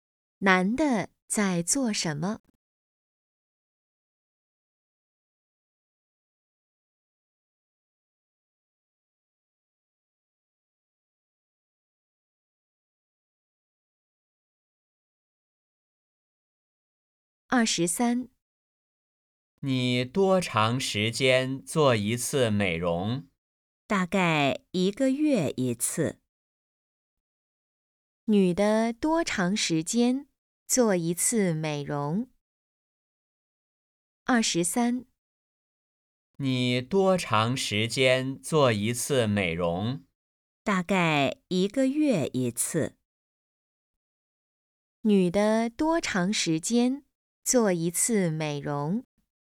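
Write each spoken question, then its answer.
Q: 女的多长时间做一次美容?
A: 一个月一次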